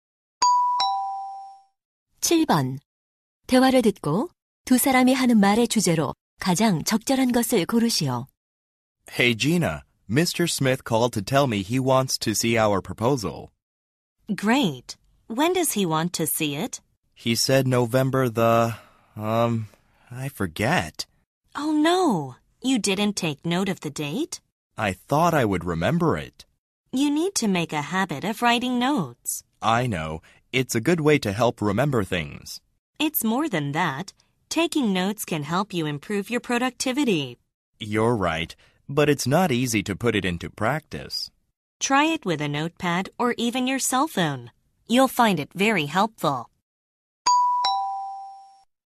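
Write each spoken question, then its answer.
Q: 대화를 듣고 두 사람이 하는 말의 주제로 가장 적절한 것을 고르시오.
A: 메모하는 습관의 중요성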